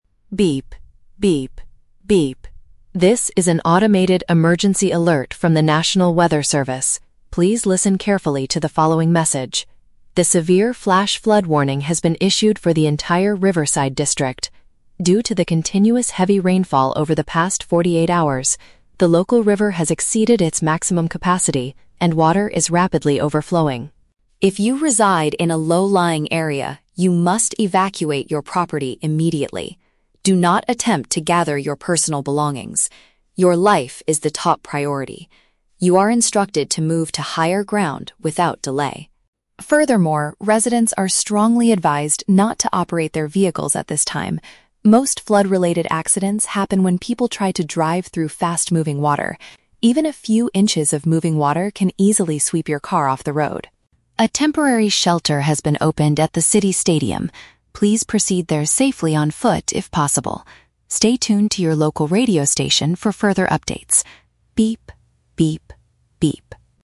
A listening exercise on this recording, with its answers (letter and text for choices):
Listen to an automated emergency broadcast and choose the correct answer (A, B, or C) for each question.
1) What is the primary cause of the current flood warning?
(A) A large water pipe in the Riverside district suddenly broke.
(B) The local river has been blocked by heavy storm debris.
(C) The region has experienced non-stop precipitation for two days.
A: (C) The region has experienced non-stop precipitation for two days.

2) What are people living in lower areas commanded to do?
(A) Quickly pack their valuable items before leaving their houses.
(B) Leave their homes right away to find an elevated location.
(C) Wait safely inside their property until a rescue team arrives.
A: (B) Leave their homes right away to find an elevated location.

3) Why does the automated voice warn citizens against using cars?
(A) Because automobiles can be easily washed away by the water.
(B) Because the heavy rain makes it impossible to see the road clearly.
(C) Because all the streets leading to the City Stadium are closed.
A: (A) Because automobiles can be easily washed away by the water.

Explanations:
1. The automated voice says the flood is due to "continuous heavy rainfall over the past forty-eight hours". "Non-stop precipitation" is a formal paraphrase of continuous rainfall, and "two days" equals forty-eight hours.
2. The warning instructs residents to "evacuate your property immediately" and "move to higher ground". "Leave their homes right away" means evacuate immediately, and an "elevated location" is a synonym for higher ground.
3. The voice warns that "moving water can easily sweep your car off the road". "Washed away" is a paraphrase of being swept off the road.

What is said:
Automated Voice: Beep. Beep. Beep. This is an automated emergency alert from the National Weather Service. Please listen carefully to the following message. A severe flash flood warning has been issued for the entire Riverside district. Due to the continuous heavy rainfall over the past forty-eight hours, the local river has exceeded its maximum capacity and water is rapidly overflowing.
If you reside in a low-lying area, you must evacuate your property immediately. Do not attempt to gather your personal belongings. Your life is the top priority. You are instructed to move to higher ground without delay.
Furthermore, residents are strongly advised not to operate their vehicles at this time. Most flood-related accidents happen when people try to drive through fast-moving water. Even a few inches of moving water can easily sweep your car off the road.
A temporary shelter has been opened at the City Stadium. Please proceed there safely on foot if possible. Stay tuned to your local radio station for further updates. Beep. Beep. Beep.